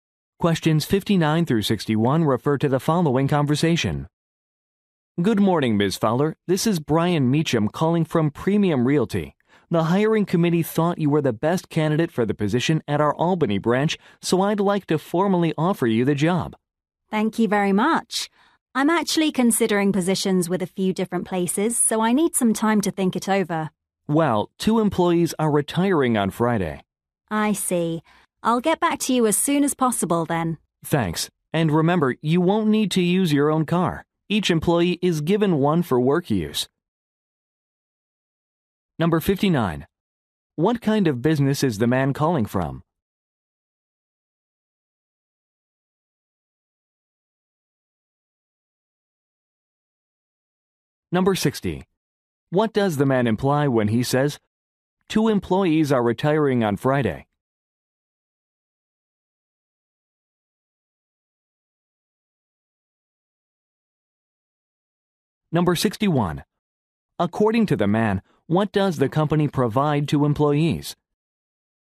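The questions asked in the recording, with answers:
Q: What kind of business is the man calling from?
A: A real estate agency

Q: What does the man imply when he says, two employees are retiring on Friday?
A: She needs to decide quickly

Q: According to the man, what does the company provide to employees?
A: A car for work use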